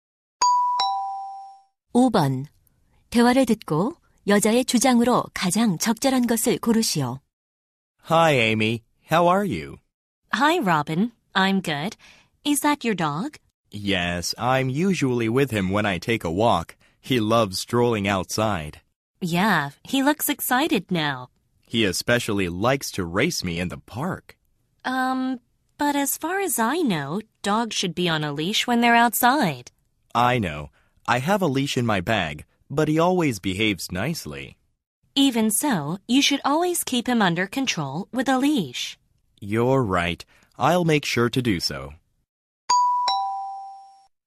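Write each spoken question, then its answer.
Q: 대화를 듣고 여자의 주장으로 가장 적절한 것을 고르시오.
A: 개를 밖에 데리고 나갈 때는 항상 목줄을 채워야 한다.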